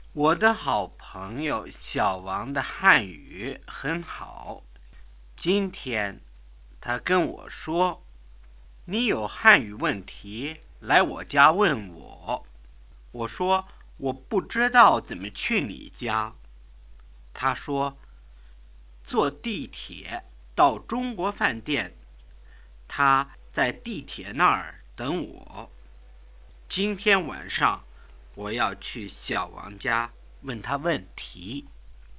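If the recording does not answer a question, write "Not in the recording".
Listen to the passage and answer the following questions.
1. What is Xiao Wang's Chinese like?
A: Very good.

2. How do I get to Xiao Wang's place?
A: Take the subway to the China Restaurant.

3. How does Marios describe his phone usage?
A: Not in the recording

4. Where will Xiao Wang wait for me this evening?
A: At the subway station.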